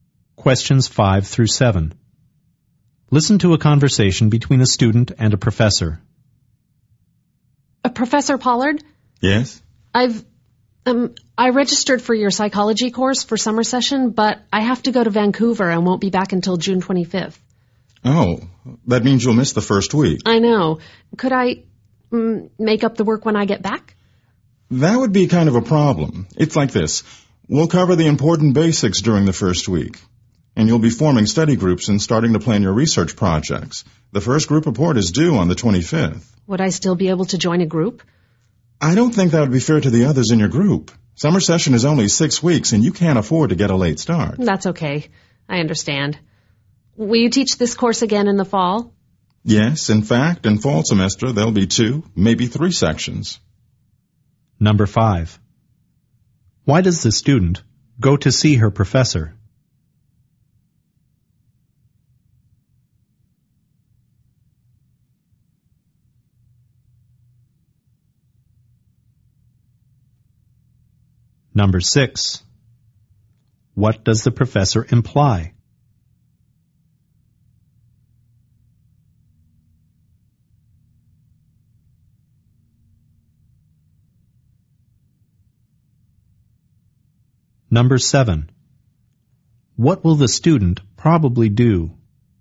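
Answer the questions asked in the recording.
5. She will miss the first week of summer session and wants to make up the work
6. The student should not take the course in the summer session
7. Take the course in the fall semester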